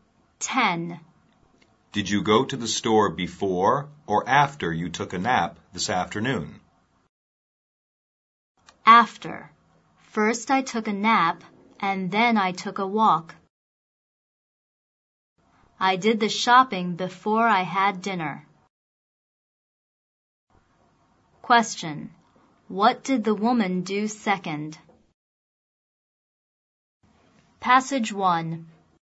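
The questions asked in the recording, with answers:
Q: What did the woman do second?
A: She took a walk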